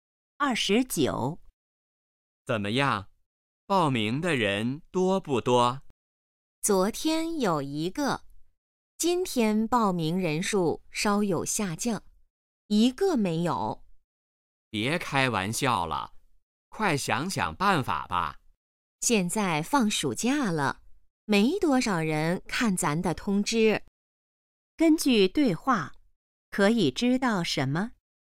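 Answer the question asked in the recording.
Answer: 报名的人很少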